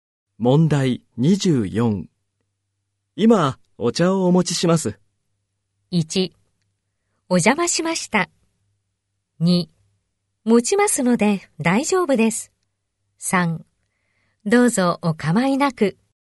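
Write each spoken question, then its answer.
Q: 今、お茶をお持ちします。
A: 3: どうぞお構いなく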